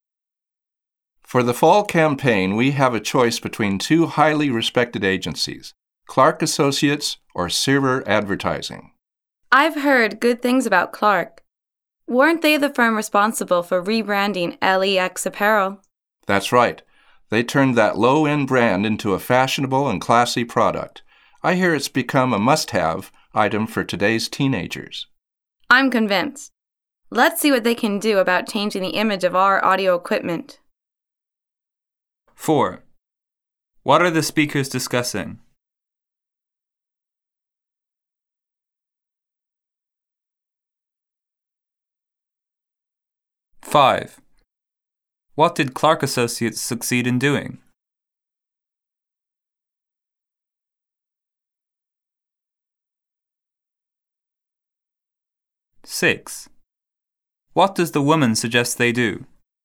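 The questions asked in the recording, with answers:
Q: What are the speakers discussing?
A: Choosing an advertising agency for the fall campaign

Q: What did Clark Associates succeed in doing?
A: Rebranding LEX Apparel into a fashionable, classy product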